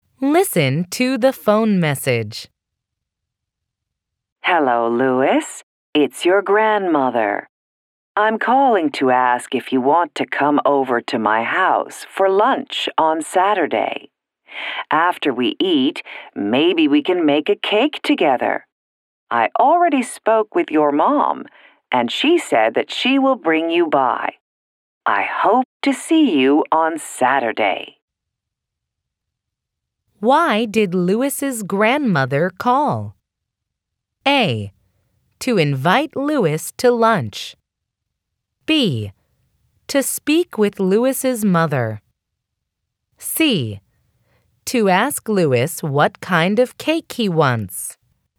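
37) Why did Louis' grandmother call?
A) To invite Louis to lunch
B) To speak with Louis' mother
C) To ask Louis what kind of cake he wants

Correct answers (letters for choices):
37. A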